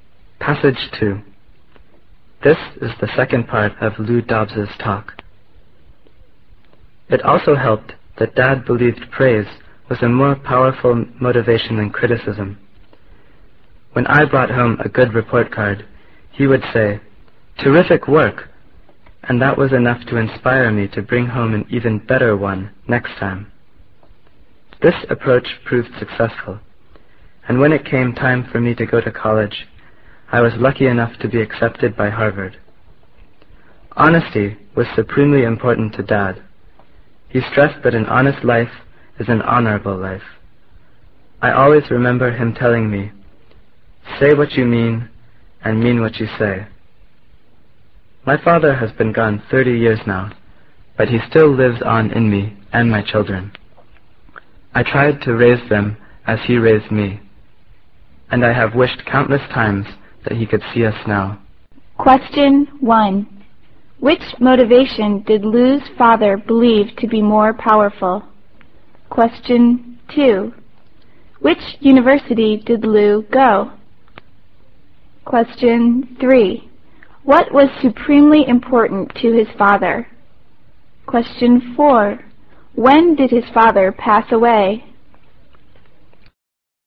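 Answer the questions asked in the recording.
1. Praise
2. Harvard
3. Honesty
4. 30 years ago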